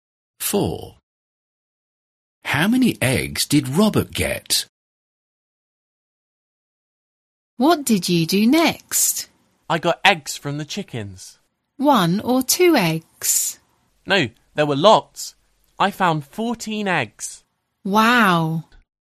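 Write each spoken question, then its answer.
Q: How many eggs did Robert get?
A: 14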